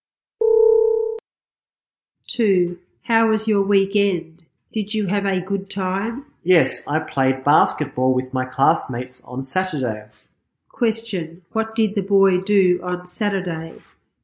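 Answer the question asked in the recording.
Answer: He played basketball with his classmates.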